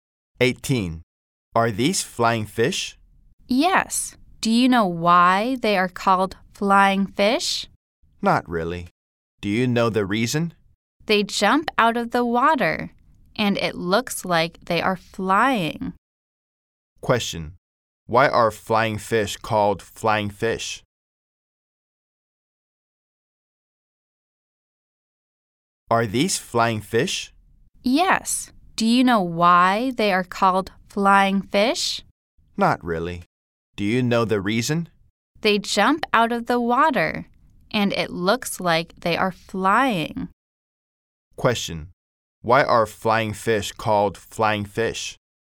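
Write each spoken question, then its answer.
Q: Why are flying fish called flying fish?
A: They jump out of the water and look like they are flying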